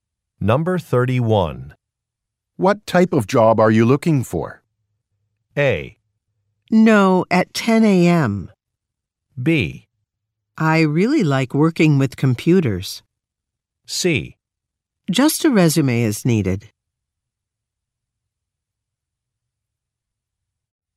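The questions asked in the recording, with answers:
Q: What type of job are you looking for?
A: B: I really like working with computers.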